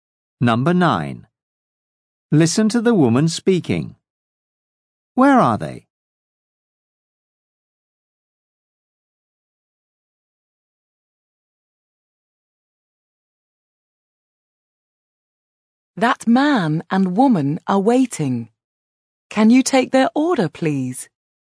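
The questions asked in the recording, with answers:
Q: Where are they?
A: in a restaurant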